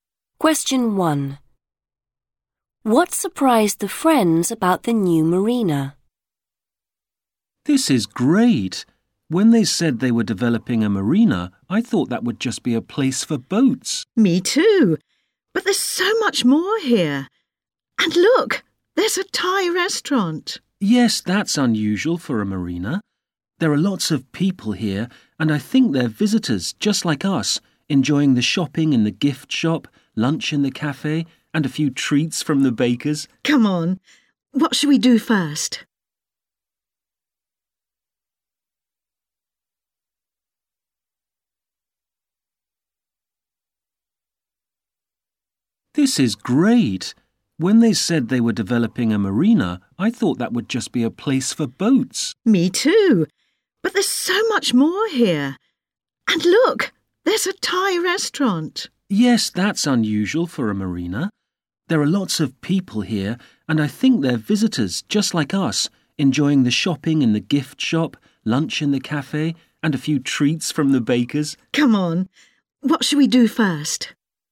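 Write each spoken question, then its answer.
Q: What surprised the friends about the new marina?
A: There's so much more than boats, e.g. a Thai restaurant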